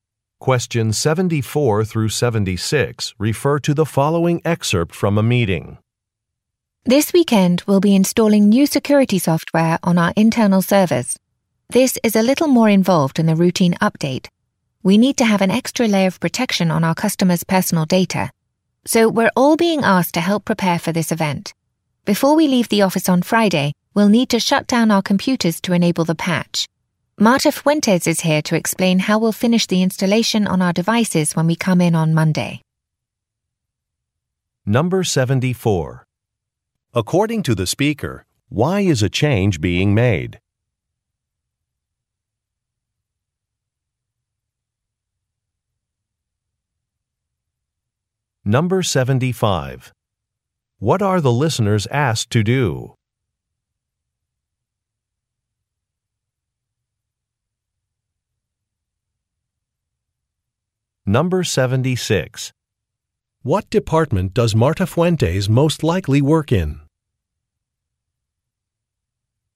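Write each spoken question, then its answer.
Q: According to the speaker, why is a change being made?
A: To add protection for customers' personal data

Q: What are the listeners asked to do?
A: Shut down their computers before leaving on Friday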